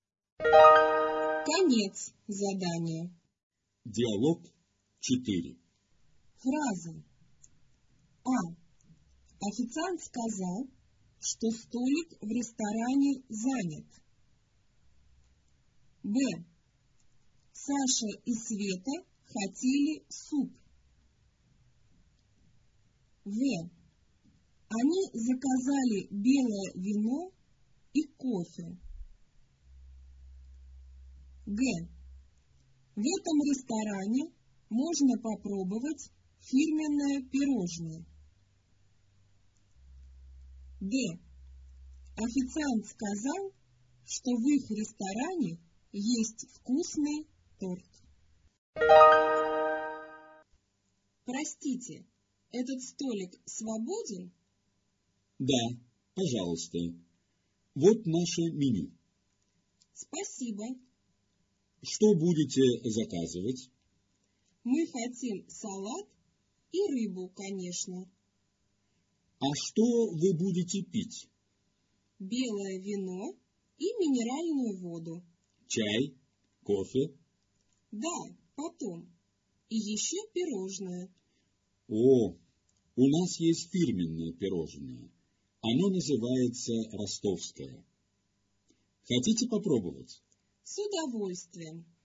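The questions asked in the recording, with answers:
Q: Официант сказал, что столик в ресторане занят.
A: минус (неверно)

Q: Саша и Света хотели суп.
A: минус (неверно)

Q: В этом ресторане можно попробовать фирменное пирожное.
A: плюс (верно)

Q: Официант сказал, что в их ресторане есть вкусный торт.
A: минус (неверно)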